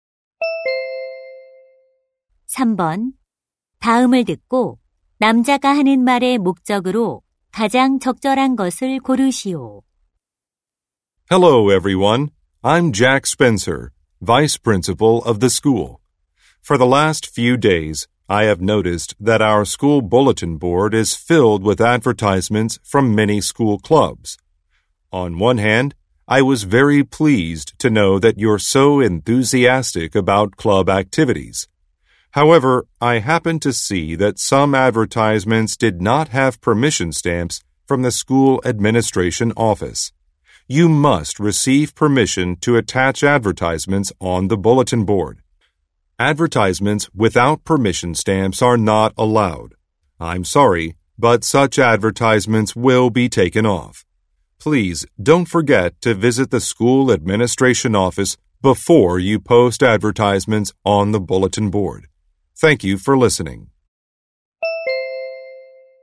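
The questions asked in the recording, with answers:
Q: 다음을 듣고 남자가 하는 말의 목적으로 가장 적절한 것을 고르시오.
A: 게시판 광고는 학교 행정실의 허가 도장을 받고 게시하도록 안내하려고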